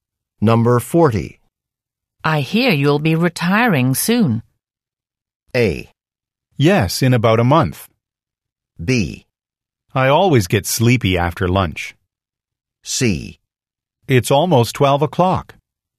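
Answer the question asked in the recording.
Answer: A: Yes, in about a month.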